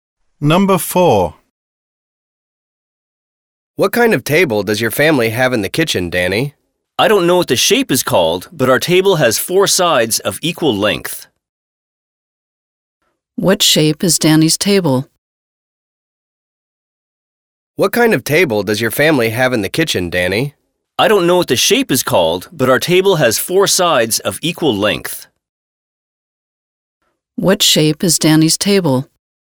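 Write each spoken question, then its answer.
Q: What shape is Danny's table?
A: Square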